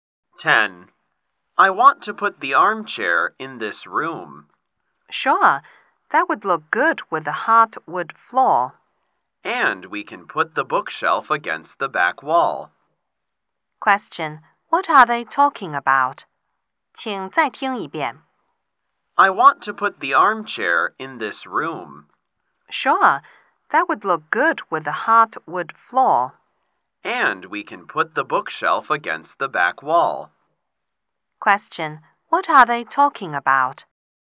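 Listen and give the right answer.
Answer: Where to put the furniture in the room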